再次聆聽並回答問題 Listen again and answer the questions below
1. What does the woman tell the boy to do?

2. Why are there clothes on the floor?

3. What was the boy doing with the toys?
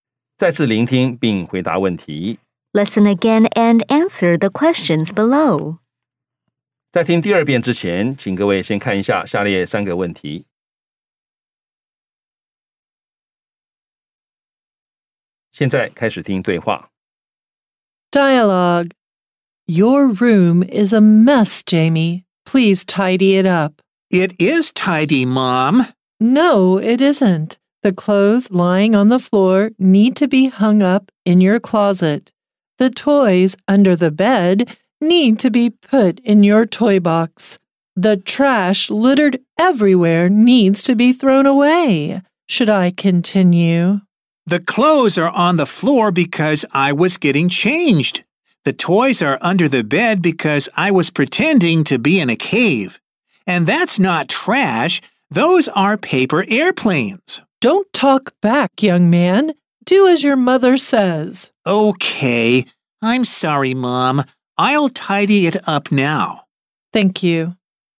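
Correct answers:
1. Tidy up his room.
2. Because he was getting changed.
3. He was pretending to be in a cave (with the toys under the bed).

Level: 中階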